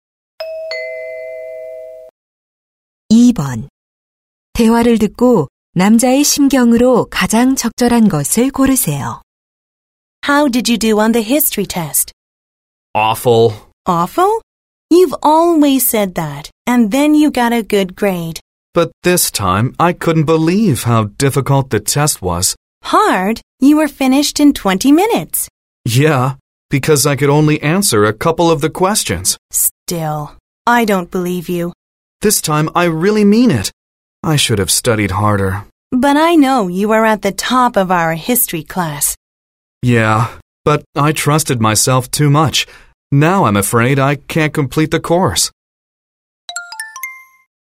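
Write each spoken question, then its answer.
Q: 대화를 듣고 남자의 심경으로 가장 적절한 것을 고르세요.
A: 후회스럽고 걱정됨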